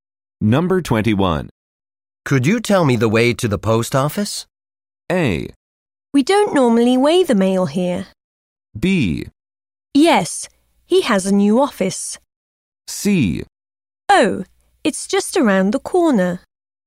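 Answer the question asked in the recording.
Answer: C: Oh, it's just around the corner.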